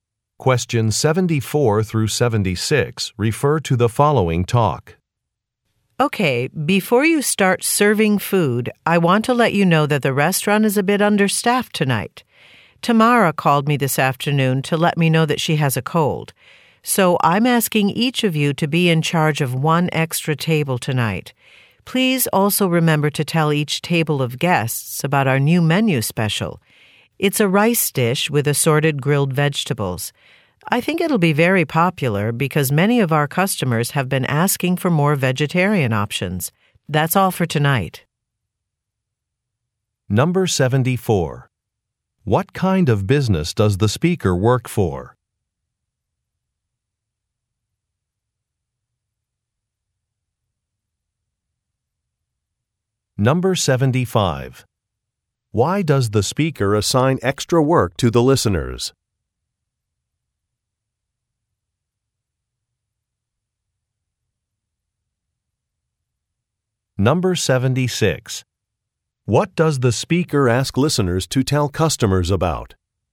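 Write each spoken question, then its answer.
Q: What kind of business does the speaker work for?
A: A restaurant

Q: Why does the speaker assign extra work to the listeners?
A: A coworker is sick, so they are understaffed

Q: What does the speaker ask listeners to tell customers about?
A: The new menu special (a vegetarian rice dish)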